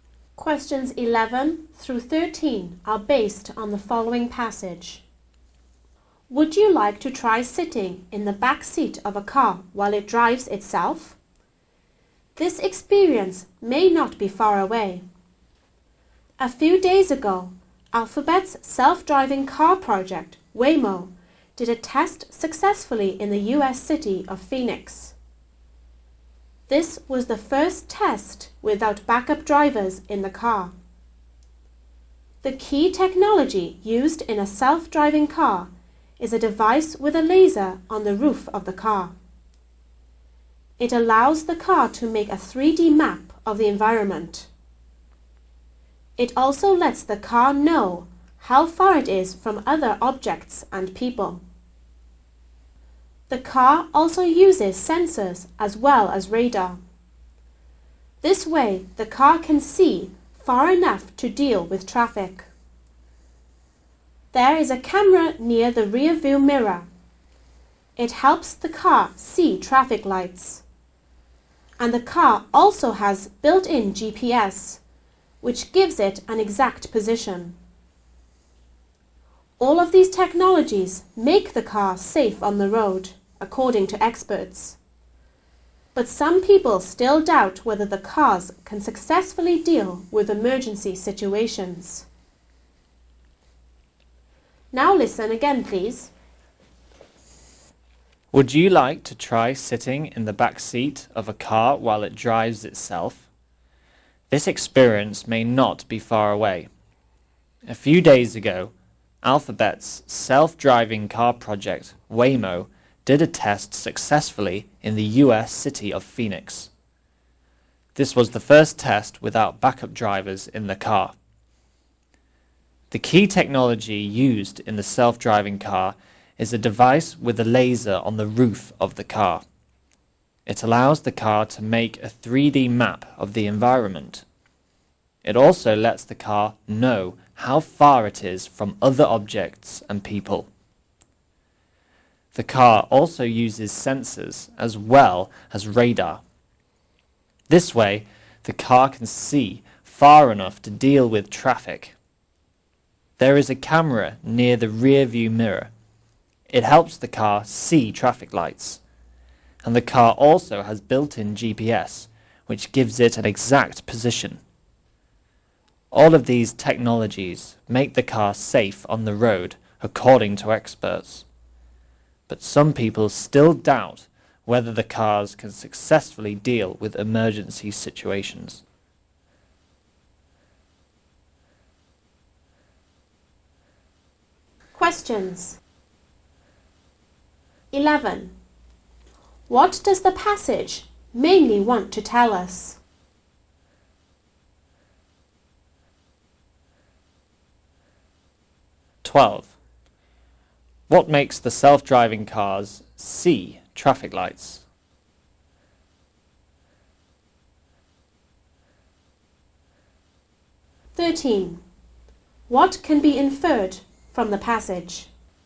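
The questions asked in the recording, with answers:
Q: What makes the self-driving cars see traffic lights?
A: A camera near the rear view mirror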